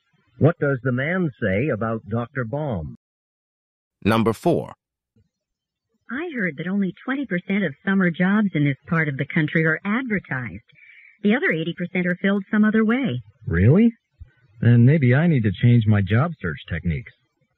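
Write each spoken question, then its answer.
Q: What can be inferred about the man?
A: He is looking for a summer job and mostly relies on advertisements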